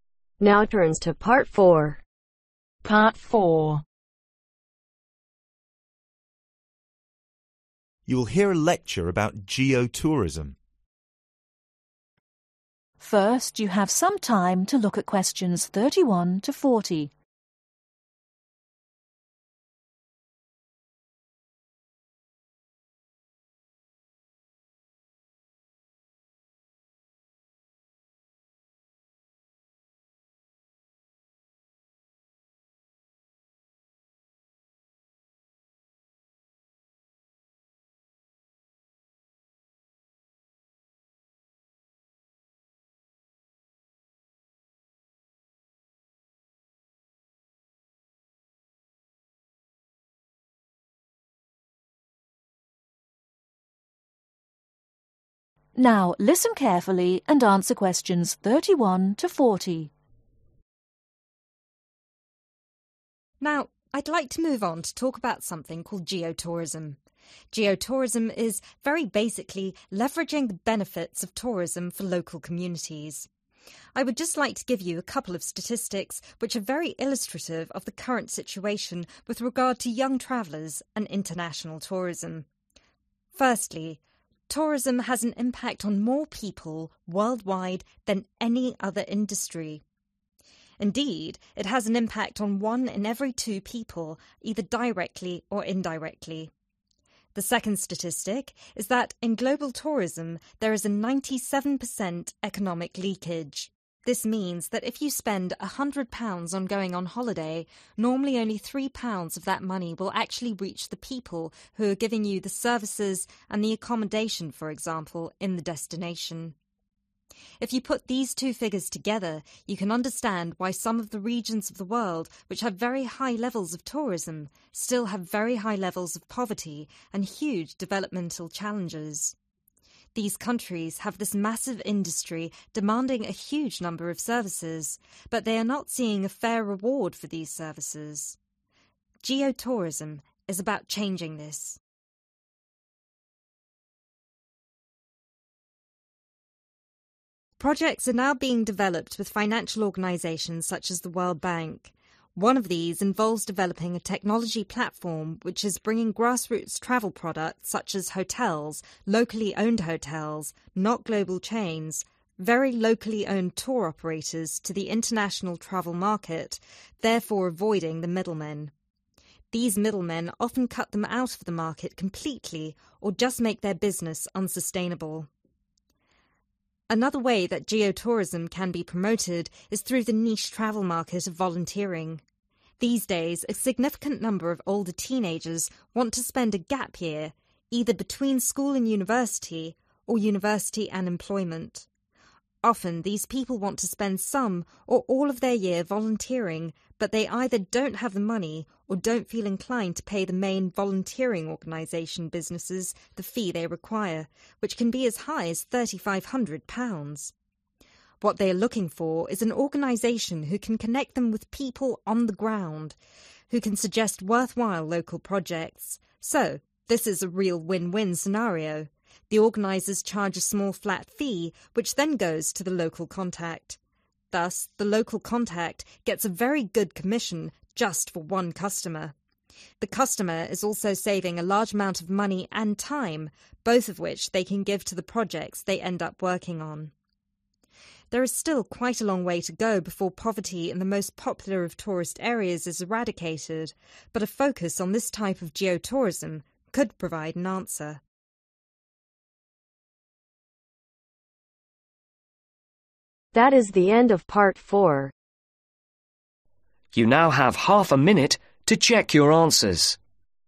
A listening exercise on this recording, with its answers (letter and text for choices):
Choose the correct answer A , B or C.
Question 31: Compared to other industries, tourism has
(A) the most young customers.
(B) the biggest impact on people.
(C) only indirect impact.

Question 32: In global tourism is a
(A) 97% economic leakage.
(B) a 9 in 10 chance of failure.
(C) about 9% economic failure.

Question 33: Some countries with high levels of tourism still have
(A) poor accommodation.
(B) great poverty.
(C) large national debt.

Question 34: Geo-tourism is all about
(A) reducing pollution from industry.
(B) increasing numbers of travelers.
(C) providing a fair reward for service.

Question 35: avoids (35)............ men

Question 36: schedule (36)............ year between school and university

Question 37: Volunteering organizations charge up to (37)£............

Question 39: Organizers would charge flat (39)............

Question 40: this would make for a good (40)............ for each customer.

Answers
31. (B) the biggest impact on people.
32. (A) 97% economic leakage.
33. (B) great poverty.
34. (C) providing a fair reward for service.
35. Middle
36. Gap
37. £3.500
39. Fee
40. Commission